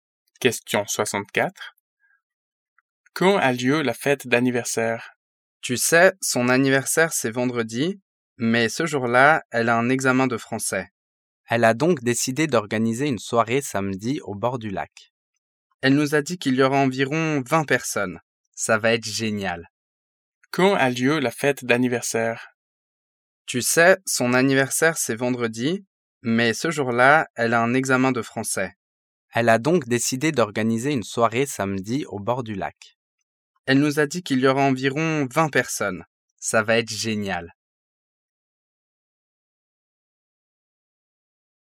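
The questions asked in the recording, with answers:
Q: Quand a lieu la fête d'anniversaire?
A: Samedi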